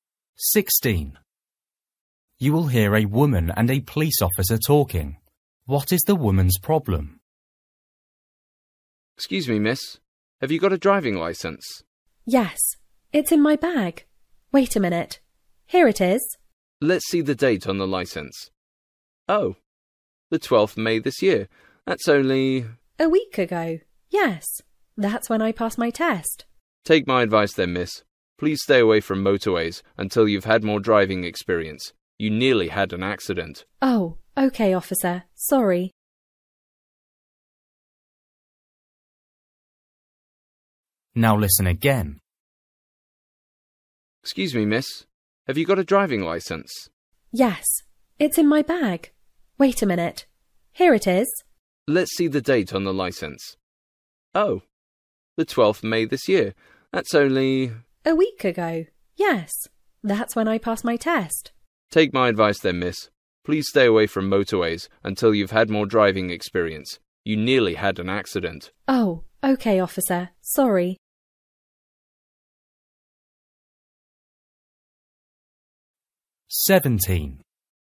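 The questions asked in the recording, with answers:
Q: What is the woman's problem?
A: She is an inexperienced driver and nearly had an accident on the motorway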